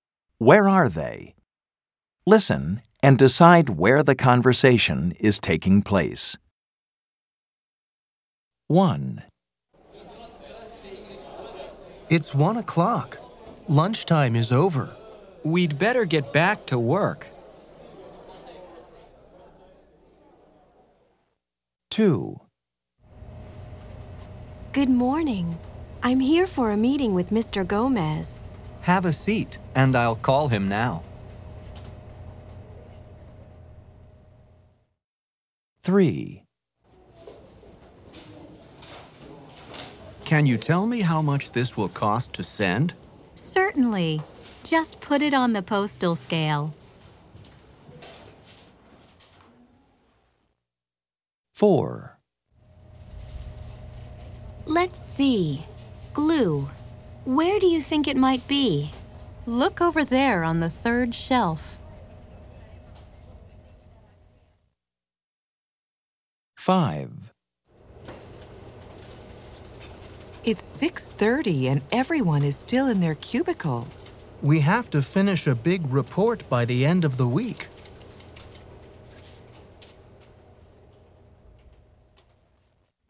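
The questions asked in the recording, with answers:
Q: Where are they?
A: at a post office

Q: Where are they?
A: in an office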